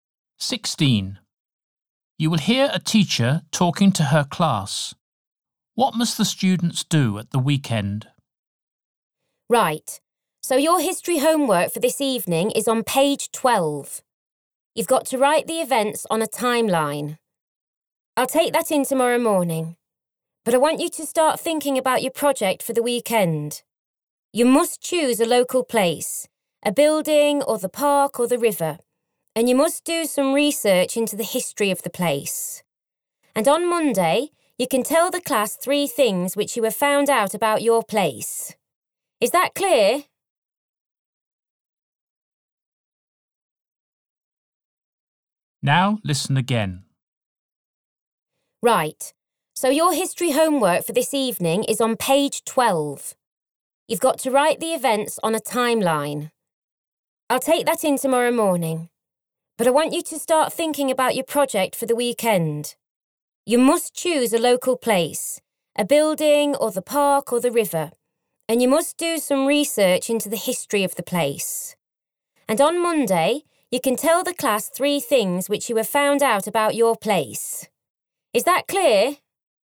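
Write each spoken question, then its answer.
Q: What must the students do at the weekend?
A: Research the history of a local place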